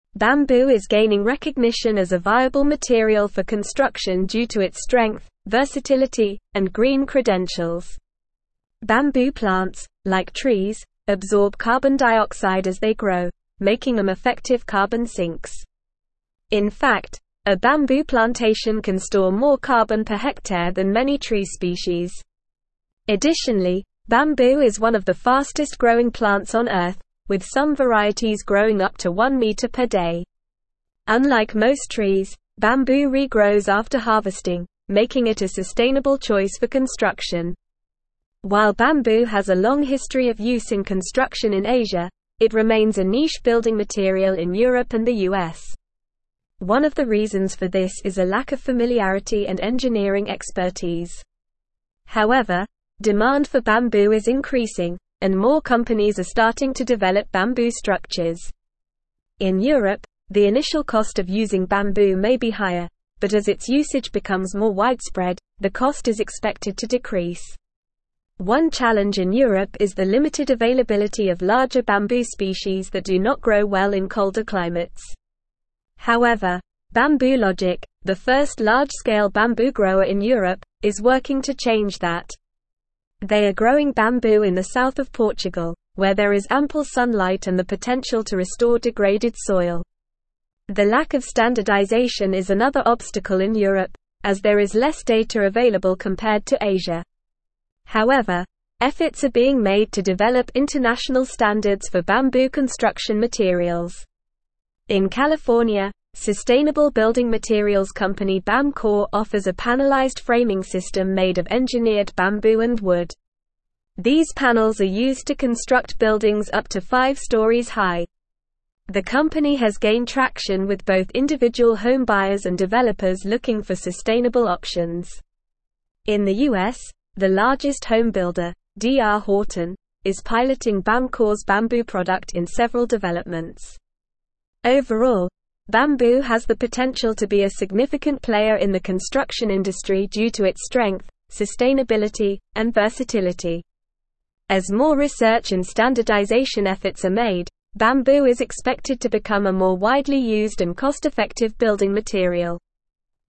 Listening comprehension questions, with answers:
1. Bamboo (1)______, like trees, absorb carbon dioxide as they grow, (2)______ them effective carbon (3)______.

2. Bamboo (1)______, like trees, absorb carbon dioxide as they grow, (2)______ them effective carbon (3)______.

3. Bamboo (1)______, like trees, absorb carbon dioxide as they grow, (2)______ them effective carbon (3)______.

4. In fact, a (4)______ plantation can store more carbon per hectare than many tree species.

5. While bamboo has a long history of use in construction in Asia, it remains a niche building material in (5)______ and the US.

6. In Europe, the initial cost of using bamboo may be (6)______, but as its usage (7)______ more widespread, the cost is expected to decrease.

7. In Europe, the initial cost of using bamboo may be (6)______, but as its usage (7)______ more widespread, the cost is expected to decrease.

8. One challenge in Europe is the (8)______ availability of larger bamboo species that do not grow well in colder climates.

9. The lack of (9)______ is another obstacle in Europe, as there is less data available compared to Asia.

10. However, efforts are being made to develop international (10)______ for bamboo construction materials.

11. In California, sustainable building materials company (11)______ offers a panelized framing system made of engineered bamboo and wood.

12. These (12)______ are used to construct buildings up to five stories high.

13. The company has gained traction with both individual homebuyers and (13)______ looking for sustainable options.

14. Overall, bamboo has the potential to be a significant (14)______ in the construction (15)______ due to its strength, sustainability, and versatility.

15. Overall, bamboo has the potential to be a significant (14)______ in the construction (15)______ due to its strength, sustainability, and versatility.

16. As more research and standardization (16)______ are made, bamboo is expected to become a more widely used and cost-effective building material.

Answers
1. plants
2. making
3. sinks
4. bamboo
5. Europe
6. higher
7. becomes
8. limited
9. standardization
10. standards
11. BamCore
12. panels
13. developers
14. player
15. industry
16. efforts

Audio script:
Bamboo is gaining recognition as a viable material for construction due to its strength, versatility, and green credentials. Bamboo plants, like trees, absorb carbon dioxide as they grow, making them effective carbon sinks. In fact, a bamboo plantation can store more carbon per hectare than many tree species. Additionally, bamboo is one of the fastest-growing plants on Earth, with some varieties growing up to one meter per day. Unlike most trees, bamboo regrows after harvesting, making it a sustainable choice for construction.
While bamboo has a long history of use in construction in Asia, it remains a niche building material in Europe and the US. One of the reasons for this is a lack of familiarity and engineering expertise. However, demand for bamboo is increasing, and more companies are starting to develop bamboo structures. In Europe, the initial cost of using bamboo may be higher, but as its usage becomes more widespread, the cost is expected to decrease.
One challenge in Europe is the limited availability of larger bamboo species that do not grow well in colder climates. However, BambooLogic, the first large-scale bamboo grower in Europe, is working to change that. They are growing bamboo in the south of Portugal, where there is ample sunlight and the potential to restore degraded soil. The lack of standardization is another obstacle in Europe, as there is less data available compared to Asia. However, efforts are being made to develop international standards for bamboo construction materials.
In California, sustainable building materials company BamCore offers a panelized framing system made of engineered bamboo and wood. These panels are used to construct buildings up to five stories high. The company has gained traction with both individual homebuyers and developers looking for sustainable options. In the US, the largest homebuilder, D.R. Horton, is piloting BamCore's bamboo product in several developments.
Overall, bamboo has the potential to be a significant player in the construction industry due to its strength, sustainability, and versatility. As more research and standardization efforts are made, bamboo is expected to become a more widely used and cost-effective building material.

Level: Level 4